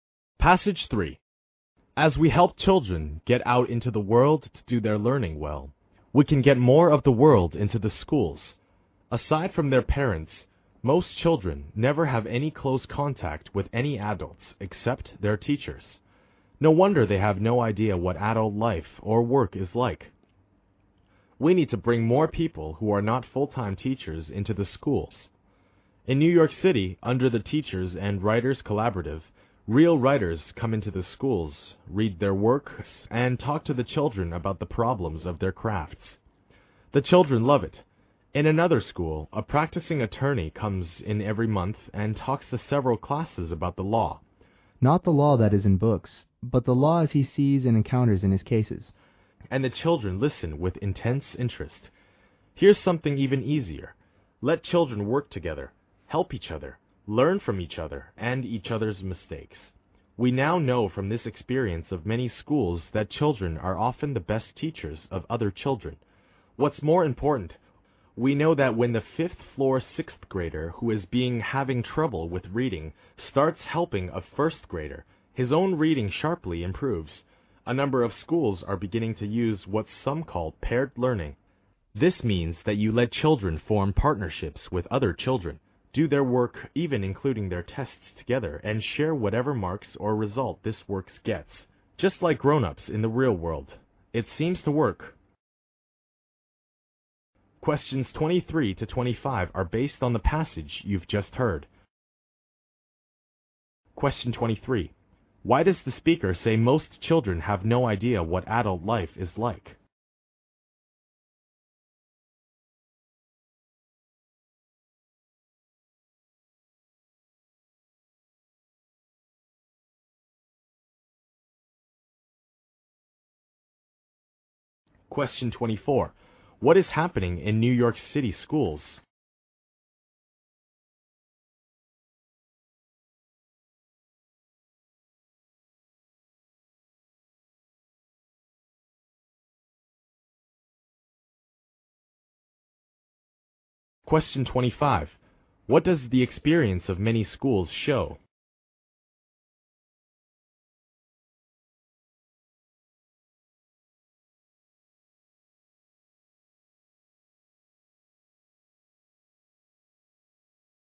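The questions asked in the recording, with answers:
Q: Why does the speaker say most children have no idea what adult life is like?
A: Apart from their parents, they have no close contact with any adults except their teachers.

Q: What is happening in New York City schools?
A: Real writers come in to read their works and talk to the children about their craft.

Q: What does the experience of many schools show?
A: Children are often the best teachers of other children.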